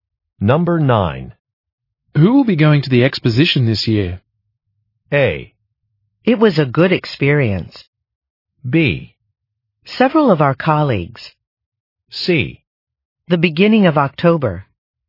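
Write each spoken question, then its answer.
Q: Who will be going to the exposition this year?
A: B: Several of our colleagues.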